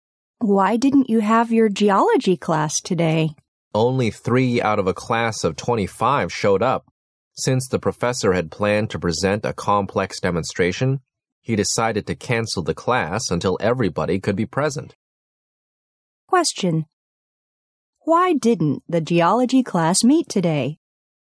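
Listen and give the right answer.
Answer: Only 3 of 25 students came, so the professor cancelled it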